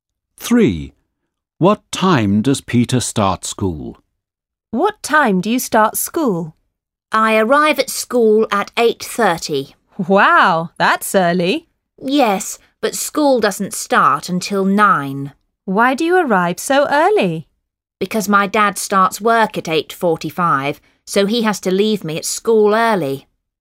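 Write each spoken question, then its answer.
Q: What time does Peter start school?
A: 9 o'clock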